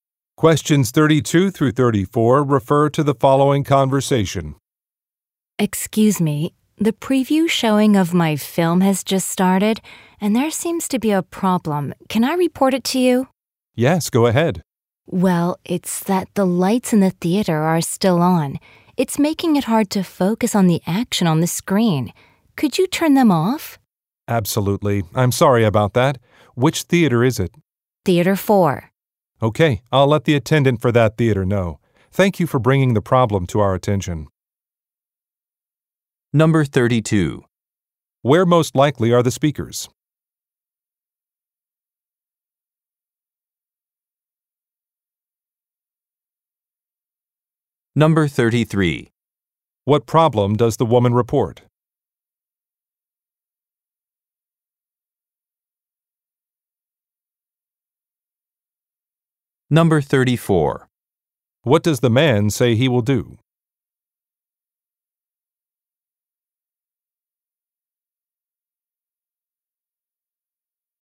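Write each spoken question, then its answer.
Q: Where most likely are the speakers?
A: At a movie theater

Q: What problem does the woman report?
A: The lights in the theater are still on

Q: What does the man say he will do?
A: Tell the attendant for Theater 4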